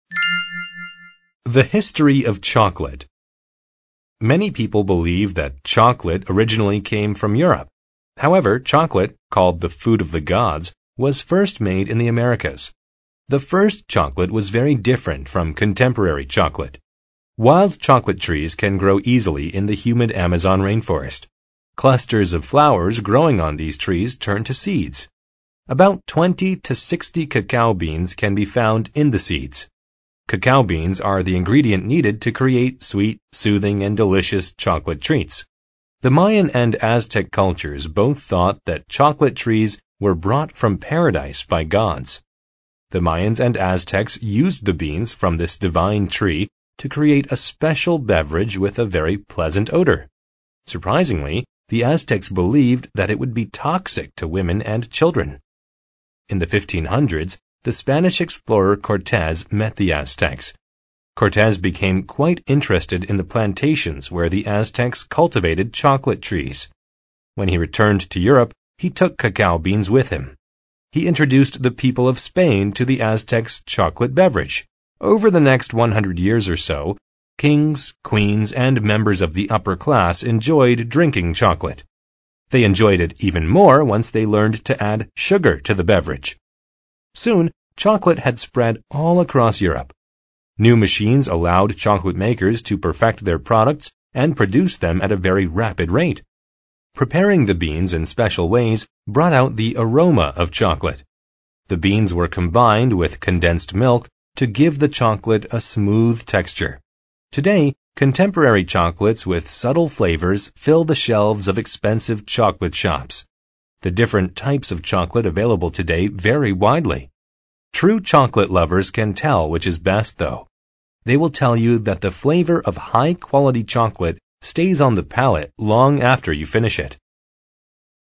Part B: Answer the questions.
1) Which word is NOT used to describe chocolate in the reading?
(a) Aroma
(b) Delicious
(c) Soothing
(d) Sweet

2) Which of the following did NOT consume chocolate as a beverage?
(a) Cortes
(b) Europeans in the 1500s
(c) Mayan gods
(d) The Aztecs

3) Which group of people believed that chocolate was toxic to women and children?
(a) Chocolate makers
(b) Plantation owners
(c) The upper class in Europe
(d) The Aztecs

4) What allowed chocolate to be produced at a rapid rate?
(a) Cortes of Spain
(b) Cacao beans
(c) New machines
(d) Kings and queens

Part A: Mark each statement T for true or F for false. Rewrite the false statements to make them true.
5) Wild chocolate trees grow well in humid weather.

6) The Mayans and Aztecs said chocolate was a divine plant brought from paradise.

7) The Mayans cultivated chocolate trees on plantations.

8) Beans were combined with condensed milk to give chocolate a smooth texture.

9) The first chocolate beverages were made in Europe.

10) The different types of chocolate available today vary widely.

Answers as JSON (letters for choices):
{"1": "a", "2": "c", "3": "d", "4": "c", "5": "T", "6": "T", "7": "F", "8": "T", "9": "F", "10": "T"}

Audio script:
Many people believe that chocolate originally came from Europe. However, chocolate, called the "food of the gods," was first made in the Americas. The first chocolate was very different from contemporary chocolate.
Wild chocolate trees can grow easily in the humid Amazon rain forest. Clusters of flowers growing on these trees turn to seeds. About 20 to 60 cacao beans can be found in the seeds. Cacao beans are the ingredient needed to create sweet, soothing, and delicious chocolate treats.
The Mayan and Aztec cultures both thought that chocolate trees were brought from paradise by gods. The Mayans and Aztecs used the beans from this divine tree to create a special beverage with a very pleasant odor. Surprisingly, the Aztecs believed that it would be toxic to women and children.
In the 1500s, the Spanish explorer Cortes met the Aztecs. Cortes became quite interested in the plantations where the Aztecs cultivated chocolate trees. When he returned to Europe, he took cacao beans with him. He introduced the people of Spain to the Aztecs' chocolate beverage.
Over the next 100 years or so, kings, queens, and members of the upper class enjoyed drinking chocolate. They enjoyed it even more once they learned to add sugar to the beverage! Soon, chocolate had spread all across Europe. New machines allowed chocolate makers to perfect their products and produce them at a very rapid rate. Preparing the beans in special ways brought out the aroma of chocolate. The beans were combined with condensed milk to give the chocolate a smooth texture.
Today, contemporary chocolates with subtle flavors fill the shelves of expensive chocolate shops. True chocolate lovers can tell which is best, though. They will tell you that the flavor of high quality chocolate stays on the palate long after you finish it.